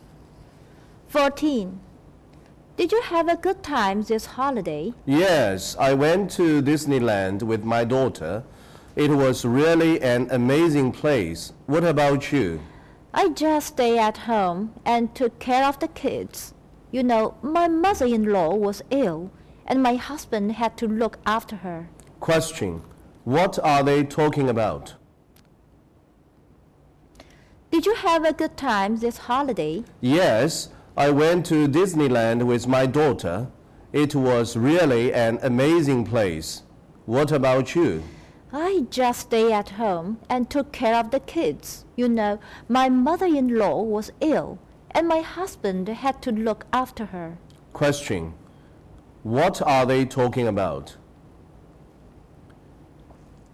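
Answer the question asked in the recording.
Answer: Their holiday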